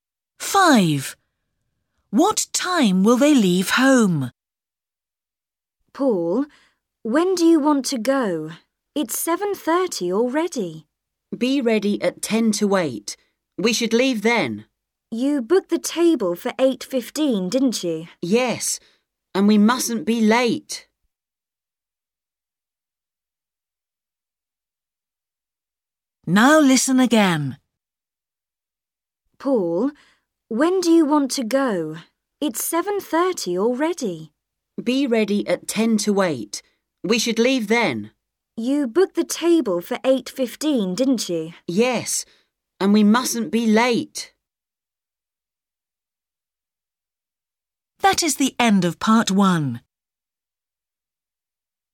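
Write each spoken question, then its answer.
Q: What time will they leave home?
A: 7:50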